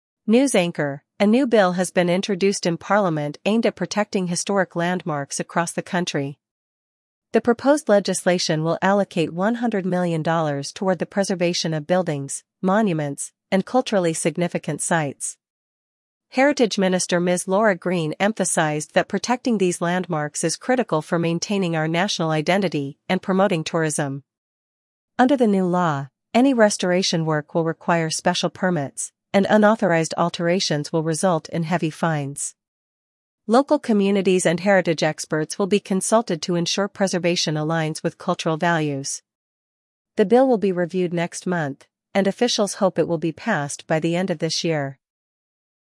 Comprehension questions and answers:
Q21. What does the new bill aim to protect?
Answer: Historic landmarks

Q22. How much funding is being allocated for preservation?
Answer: $100 million

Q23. Who is the Heritage Minister?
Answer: Ms. Laura Green

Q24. What will restoration work require under the new law?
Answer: Special permits

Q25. What consequence will result from unauthorized alterations?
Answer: Heavy fines

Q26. When will the bill be reviewed?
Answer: Next month

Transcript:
News Anchor: A new bill has been introduced in Parliament aimed at protecting historic landmarks across the country. The proposed legislation will allocate $100 million toward the preservation of buildings, monuments, and culturally significant sites.
Heritage Minister Ms. Laura Green emphasized that protecting these landmarks is critical for maintaining our national identity and promoting tourism.
Under the new law, any restoration work will require special permits, and unauthorized alterations will result in heavy fines. Local communities and heritage experts will be consulted to ensure preservation aligns with cultural values.
The bill will be reviewed next month, and officials hope it will be passed by the end of this year.